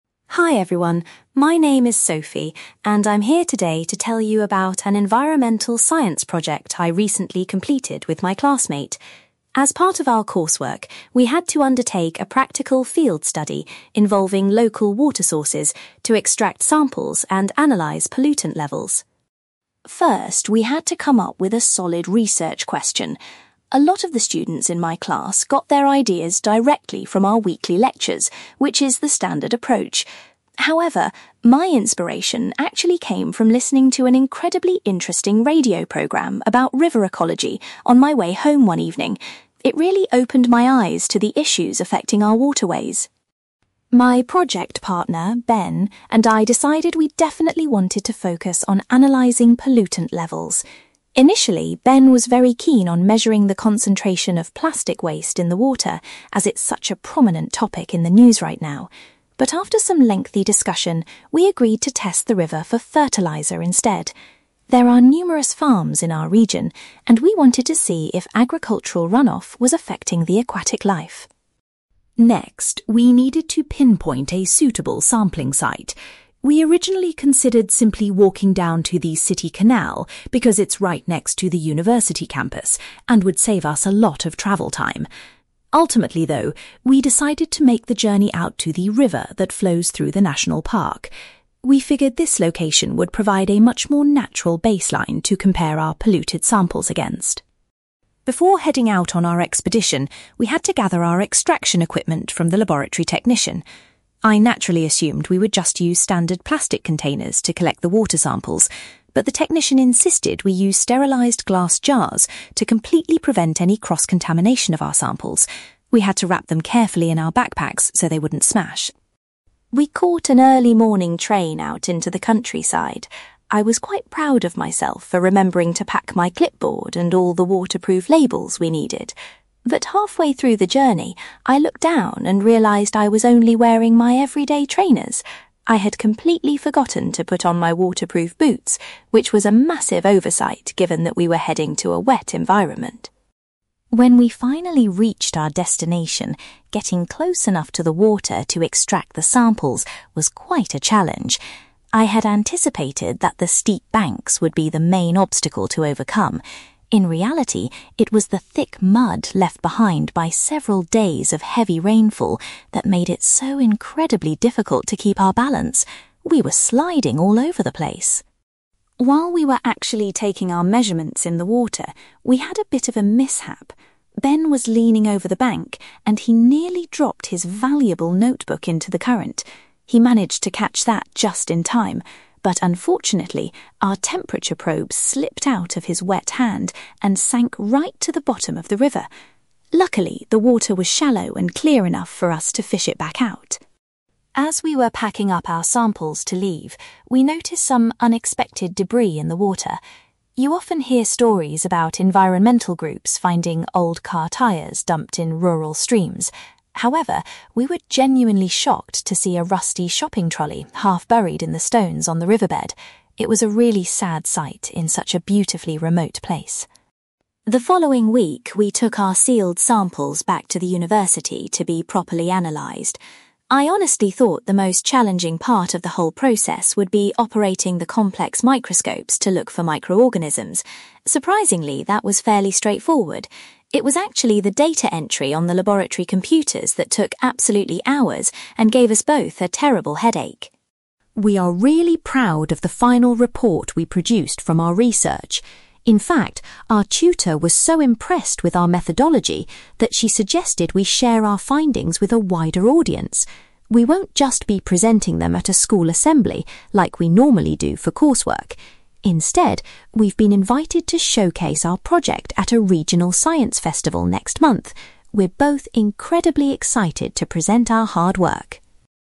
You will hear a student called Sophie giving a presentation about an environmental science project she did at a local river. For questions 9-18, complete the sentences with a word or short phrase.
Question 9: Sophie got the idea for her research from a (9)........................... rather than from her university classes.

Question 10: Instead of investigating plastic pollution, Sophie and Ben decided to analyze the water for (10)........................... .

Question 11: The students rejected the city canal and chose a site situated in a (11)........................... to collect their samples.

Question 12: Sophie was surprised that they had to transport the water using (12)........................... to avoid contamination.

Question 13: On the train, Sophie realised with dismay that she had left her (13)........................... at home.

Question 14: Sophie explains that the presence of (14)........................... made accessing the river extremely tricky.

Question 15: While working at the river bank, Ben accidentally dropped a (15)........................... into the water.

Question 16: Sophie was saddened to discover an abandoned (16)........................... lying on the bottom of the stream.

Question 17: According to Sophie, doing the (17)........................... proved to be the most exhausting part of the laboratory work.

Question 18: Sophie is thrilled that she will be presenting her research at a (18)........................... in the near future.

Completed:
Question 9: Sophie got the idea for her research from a radio programme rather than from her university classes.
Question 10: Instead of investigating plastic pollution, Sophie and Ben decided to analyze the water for fertiliser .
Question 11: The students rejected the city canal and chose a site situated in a national park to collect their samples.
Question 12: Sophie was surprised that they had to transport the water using glass jars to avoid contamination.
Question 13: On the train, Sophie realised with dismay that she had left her waterproof boots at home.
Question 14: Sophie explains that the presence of thick mud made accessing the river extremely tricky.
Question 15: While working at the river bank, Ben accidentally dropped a temperature probe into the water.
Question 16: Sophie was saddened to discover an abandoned shopping trolley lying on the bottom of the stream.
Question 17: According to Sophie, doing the data entry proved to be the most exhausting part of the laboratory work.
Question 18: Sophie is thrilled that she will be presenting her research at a science festival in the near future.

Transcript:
Sophie: Hi everyone, my name is Sophie, and I'm here today to tell you about an environmental science project I recently completed with my classmate. As part of our coursework, we had to undertake a practical field study involving local water sources to extract samples and analyze pollutant levels.
First, we had to come up with a solid research question. A lot of the students in my class got their ideas directly from our weekly lectures, which is the standard approach. However, my inspiration actually came from listening to an incredibly interesting radio programme about river ecology on my way home one evening. It really opened my eyes to the issues affecting our waterways.
My project partner, Ben, and I decided we definitely wanted to focus on analyzing pollutant levels. Initially, Ben was very keen on measuring the concentration of plastic waste in the water, as it's such a prominent topic in the news right now. But after some lengthy discussion, we agreed to test the river for fertiliser instead. There are numerous farms in our region, and we wanted to see if agricultural run-off was affecting the aquatic life.
Next, we needed to pinpoint a suitable sampling site. We originally considered simply walking down to the city canal because it's right next to the university campus and would save us a lot of travel time. Ultimately, though, we decided to make the journey out to the river that flows through the national park. We figured this location would provide a much more natural baseline to compare our polluted samples against.
Before heading out on our expedition, we had to gather our extraction equipment from the laboratory technician. I naturally assumed we would just use standard plastic containers to collect the water samples. But the technician insisted we use sterilized glass jars to completely prevent any cross-contamination of our samples. We had to wrap them carefully in our backpacks so they wouldn't smash!
We caught an early morning train out into the countryside. I was quite proud of myself for remembering to pack my clipboard and all the waterproof labels we needed. But halfway through the journey, I looked down and realised I was only wearing my everyday trainers! I had completely forgotten to put on my waterproof boots, which was a massive oversight given that we were heading to a wet environment.
When we finally reached our destination, getting close enough to the water to extract the samples was quite a challenge. I had anticipated that the steep banks would be the main obstacle to overcome. In reality, it was the thick mud left behind by several days of heavy rainfall that made it so incredibly difficult to keep our balance. We were sliding all over the place!
While we were actually taking our measurements in the water, we had a bit of a mishap. Ben was leaning over the bank, and he nearly dropped his valuable notebook into the current. He managed to catch that just in time, but unfortunately, our temperature probe slipped out of his wet hand and sank right to the bottom of the river! Luckily, the water was shallow and clear enough for us to fish it back out.
As we were packing up our samples to leave, we noticed some unexpected debris in the water. You often hear stories about environmental groups finding old car tyres dumped in rural streams. However, we were genuinely shocked to see a rusty shopping trolley half-buried in the stones on the riverbed. It was a really sad sight in such a beautifully remote place.
The following week, we took our sealed samples back to the university to be properly analyzed. I honestly thought the most challenging part of the whole process would be operating the complex microscopes to look for microorganisms. Surprisingly, that was fairly straightforward. It was actually the data entry on the laboratory computers that took absolutely hours and gave us both a terrible headache.
We are really proud of the final report we produced from our research. In fact, our tutor was so impressed with our methodology that she suggested we share our findings with a wider audience. We won't just be presenting them at a school assembly like we normally do for coursework. Instead, we've been invited to showcase our project at a regional science festival next month. We're both incredibly excited to present our hard work!

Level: B2